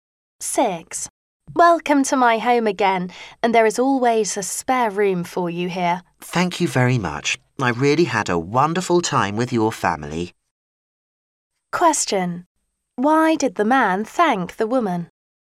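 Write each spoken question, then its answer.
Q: Why did the man thank the woman?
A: For her hospitality; he had a wonderful time with her family.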